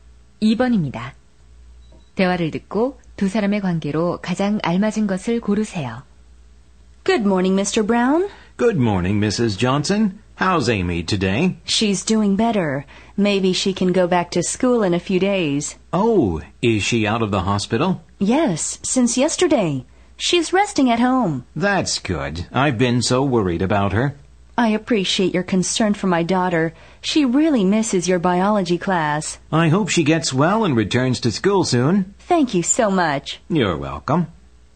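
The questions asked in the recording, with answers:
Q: 대화를 듣고 두 사람의 관계로 가장 알맞은 것을 고르세요.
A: 학부모와 교사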